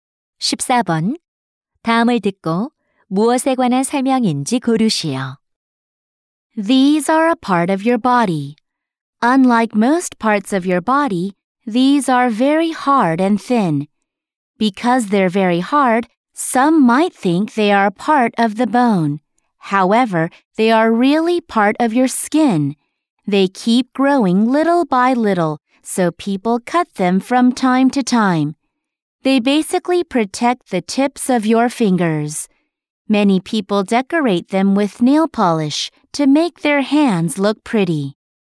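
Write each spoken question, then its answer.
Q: 다음을 듣고 무엇에 관한 설명인지 고르시오.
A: 손톱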